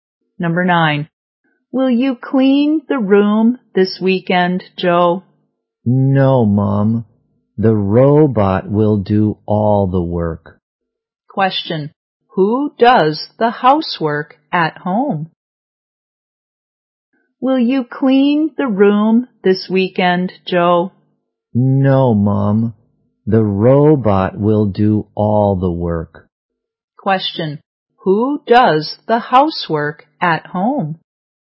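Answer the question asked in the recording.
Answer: The robot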